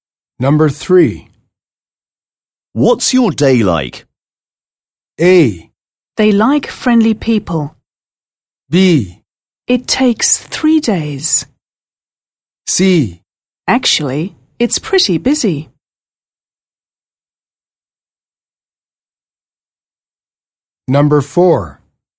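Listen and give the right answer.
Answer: C: Actually, it's pretty busy.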